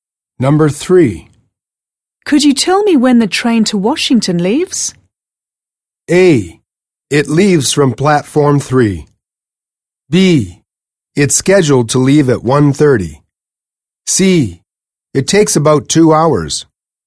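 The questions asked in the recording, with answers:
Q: Could you tell me when the train to Washington leaves?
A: B: It's scheduled to leave at 1:30.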